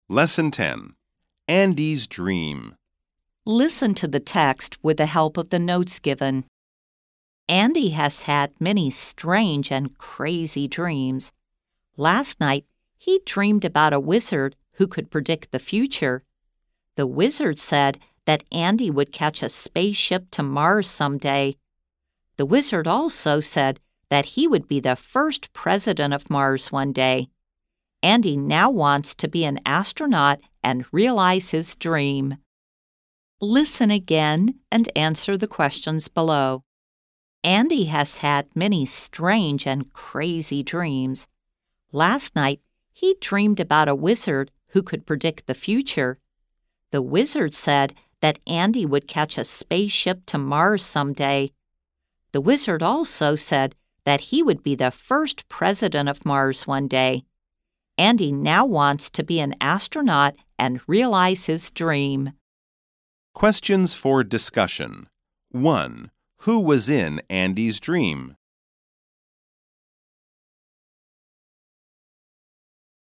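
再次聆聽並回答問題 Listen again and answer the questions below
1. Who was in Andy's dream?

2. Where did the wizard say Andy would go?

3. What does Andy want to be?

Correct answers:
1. A wizard
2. To Mars
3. An astronaut

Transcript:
Andy has had many strange and crazy dreams. Last night, he dreamed about a wizard who could predict the future. The wizard said that Andy would catch a spaceship to Mars someday. The wizard also said that he would be the first president of Mars one day. Andy now wants to be an astronaut and realize his dream!

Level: 中階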